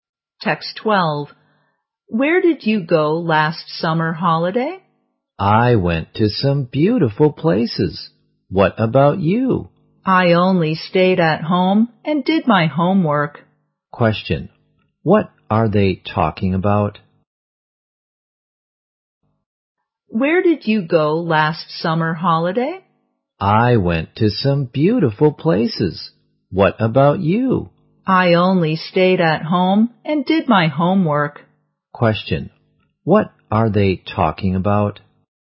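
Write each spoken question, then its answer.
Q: What are they talking about?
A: Their last summer holiday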